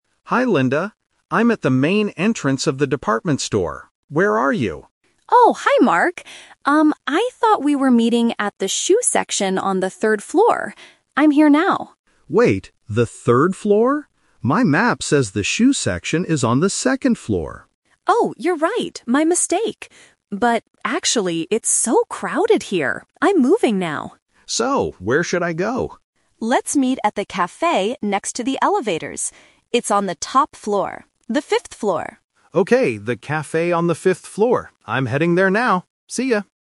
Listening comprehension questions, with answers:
Listen to the conversation and choose the correct answer (A, B, or C).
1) Where was Linda when she first answered the phone?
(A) At the main entrance.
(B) In the shoe section.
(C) In the café.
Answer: (B) In the shoe section.

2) Why did Linda decide to change her location?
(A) Because the place was too noisy and busy.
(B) Because she finished her shopping.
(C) Because the store was closing.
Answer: (A) Because the place was too noisy and busy.

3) On which floor will the two friends finally meet?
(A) The second floor.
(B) The third floor.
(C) The fifth floor.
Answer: (C) The fifth floor.

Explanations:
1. Linda says, "I thought we were meeting at the shoe section... I'm here now." Trap: Option (A) is where Mark is standing. Option (C) is where they will go later.
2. Linda uses the word "crowded" ("it's so crowded here"), which is a synonym for a place being busy with many people. Trap: A2 students often listen for the exact word. Here, "crowded" justifies why she moved.
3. This is "The Twist". They talked about the 3rd floor and 2nd floor, but Linda finally says, "Let's meet at the café... on the fifth floor." Trap: Option (A) and (B) are mentioned during the "confusion" part of the talk, but they are NOT the final destination.

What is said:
Mark: Hi Linda, I'm at the main entrance of the department store. Where are you?
Linda: Oh, hi Mark! Um, I thought we were meeting at the shoe section on the third floor. I'm here now.
Mark: Wait, the third floor? My map says the shoe section is on the second floor.
Linda: Oh, you're right! My mistake. But... actually, it's so crowded here. I'm moving now.
Mark: So, where should I go?
Linda: Let's meet at the café next to the elevators. It's on the top floor—the fifth floor.

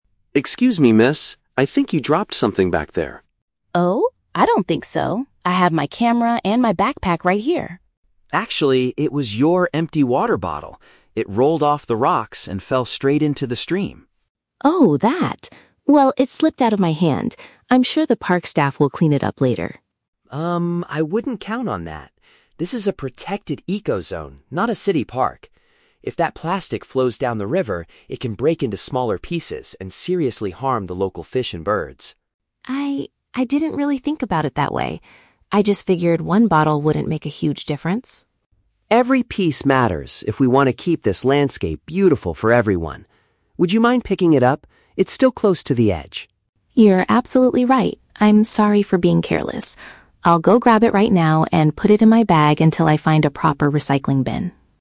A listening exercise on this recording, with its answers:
Listen to a conversation between two tourists near a river. Choose the correct answer (A, B, or C) for each question.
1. What did the woman leave behind near the rocks?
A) Her photographic equipment.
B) A plastic container for drinking.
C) A bag containing her personal items.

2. Why does the man insist that she should pick it up?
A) Because the park workers are currently on strike.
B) Because it could cause damage to the area's wildlife.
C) Because the river water is used for the city's drinking supply.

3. How does the woman react at the end of the conversation?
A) She admits her mistake and agrees to take the item with her.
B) She gets angry at the man for telling her what to do.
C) She is confused about where to find the nearest recycling bin.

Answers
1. B) A plastic container for drinking.
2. B) Because it could cause damage to the area's wildlife.
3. A) She admits her mistake and agrees to take the item with her.

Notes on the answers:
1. Mark points out that it was her "empty water bottle" that fell into the stream. "Water bottle" is paraphrased as "a plastic container for drinking." Why traps are wrong: Options A and C are Traps. Sophie mentions her "camera" (photographic equipment) and "backpack" (bag), but she says she still has them, she didn't leave them behind.
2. Mark explains that the plastic can "seriously harm the local fish and birds." "Harm the local fish and birds" is paraphrased as "cause damage to the area's wildlife." Why traps are wrong: Option A is a Trap. Sophie mentions the "park staff," but the man doesn't say they are on strike; he just says she shouldn't count on them to clean it up. Option C is plausible for a river, but it is not mentioned in the audio.
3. Sophie says, "You're absolutely right. I'm sorry for being careless," and promises to "grab it right now and put it in my bag." This shows she admits her mistake and takes it with her. Why traps are wrong: Option B is the opposite of the truth; she is very polite and apologetic at the end. Option C is a Trap. She mentions she will hold it "until I find a proper recycling bin," but she is not confused or asking for directions to one.

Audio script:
Mark: Excuse me, miss? I think you dropped something back there.
Sophie: Oh? I don't think so. I have my camera and my backpack right here.
Mark: Actually, it was your empty water bottle. It rolled off the rocks and fell straight into the stream.
Sophie: Oh, that. Well, it slipped out of my hand. I'm sure the park staff will clean it up later.
Mark: Um, I wouldn't count on that. This is a protected eco-zone, not a city park. If that plastic flows down the river, it can break into smaller pieces and seriously harm the local fish and birds.
Sophie: I... I didn't really think about it that way. I just figured one bottle wouldn't make a huge difference.
Mark: Every piece matters if we want to keep this landscape beautiful for everyone. Would you mind picking it up? It's still close to the edge.
Sophie: You're absolutely right. I'm sorry for being careless. I'll go grab it right now and put it in my bag until I find a proper recycling bin.

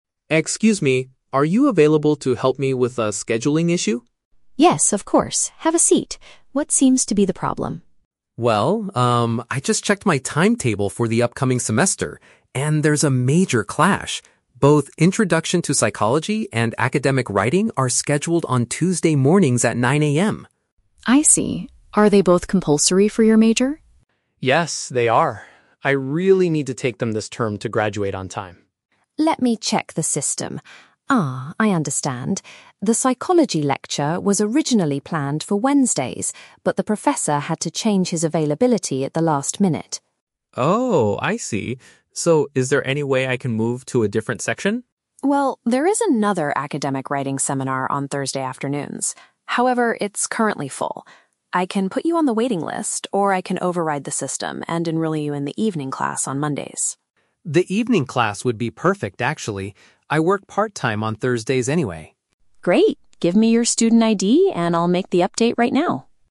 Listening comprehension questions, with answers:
Listen to a conversation between a student and a university staff member, and choose the correct answer (A, B, or C) for each question.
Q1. Why does the student need to talk to the staff member?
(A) To complain about a professor's teaching style.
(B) To ask for fewer classes in the upcoming semester.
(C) To fix a time conflict between two required courses.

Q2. Why did the scheduling problem happen?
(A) A teacher moved their class to a different day.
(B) The university computer system made a calculation error.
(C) The student accidentally chose the same time for two classes.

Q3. Which solution does the student choose?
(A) Adding his name to the waiting list for Thursday.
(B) Joining a writing seminar that takes place at night.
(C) Quitting his part-time job to attend the Thursday class.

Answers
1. (C) To fix a time conflict between two required courses.
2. (A) A teacher moved their class to a different day.
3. (B) Joining a writing seminar that takes place at night.

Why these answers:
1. The student mentions a "major clash" between two subjects that are "compulsory." "Time conflict" is a synonym for clash, and "required" is a synonym for compulsory. Trap Analysis: Option (A) is a trap. A professor is mentioned, but the student is not complaining about teaching. Option (B) is a plausible request in a university office, but it is not mentioned in the audio.
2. Option (B) is a trap. The staff checks the "system," but the system did not make an error; the professor changed the time. Option (C) is a trap because the student did not make a mistake.
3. The staff offers an "evening class on Mondays," and the student says it would be "perfect." "At night" is a paraphrase of evening. Trap Analysis: Option (A) is a trap. The waiting list is mentioned, but the student does not choose it because he works on Thursdays. Option (C) is a trap. He mentions his part-time job, but he does not quit it.

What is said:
Student: "Excuse me, are you available to help me with a scheduling issue?"
Staff: "Yes, of course. Have a seat. What seems to be the problem?"
Student: "Well, um, I just checked my timetable for the upcoming semester, and there's a major clash. Both Introduction to Psychology and Academic Writing are scheduled on Tuesday mornings at 9 AM."
Staff: "I see. Are they both compulsory for your major?"
Student: "Yes, they are. I really need to take them this term to graduate on time."
Staff: "Let me check the system... Ah, I understand. The Psychology lecture was originally planned for Wednesdays, but the professor had to change his availability at the last minute."
Student: "Oh, I see. So, is there any way I can move to a different section?"
Staff: "Well, there is another Academic Writing seminar on Thursday afternoons. However, it's currently full. I can put you on the waiting list, or I can override the system and enroll you in the evening class on Mondays."
Student: "The evening class would be perfect, actually. I work part-time on Thursdays anyway."
Staff: "Great. Give me your student ID, and I'll make the update right now."

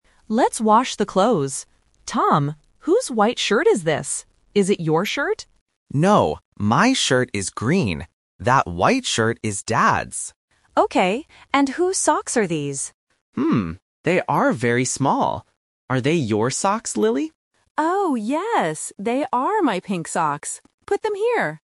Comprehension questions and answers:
Listen to the conversation between a brother and sister. Choose the correct answer (A, B, or C) for each question.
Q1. Whose white shirt is it?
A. Tom's.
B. Dad's.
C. Lily's.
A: B. Dad's.

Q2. What color is Tom's shirt?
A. Green.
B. White.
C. Pink.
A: A. Green.

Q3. Whose socks are they?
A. Tom's.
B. Dad's.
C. Lily's.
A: C. Lily's.

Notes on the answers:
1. Tom clearly says, "That white shirt is Dad's." Option A (Tom's) is the trap because Lily asks him first ("Is it your shirt?"), but he says no. Option C is not mentioned for the shirt.
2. When Lily asks about the white shirt, Tom answers, "No, my shirt is green." Option B (White) is the trap because it is the color of Dad's shirt. Option C (Pink) is the color of the socks.
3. Tom asks Lily, "Are they your socks, Lily?" and Lily answers, "Oh, yes! They are my pink socks." Option A (Tom's) is the trap because Tom is the one holding or looking at them, but they are too small for him. Option B is not mentioned for the socks.

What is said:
Lily: Let's wash the clothes. Tom, whose white shirt is this? Is it your shirt?
Tom: No, my shirt is green. That white shirt is Dad's.
Lily: Okay. And whose socks are these?
Tom: Hmm... they are very small. Are they your socks, Lily?
Lily: Oh, yes! They are my pink socks. Put them here.

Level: A1

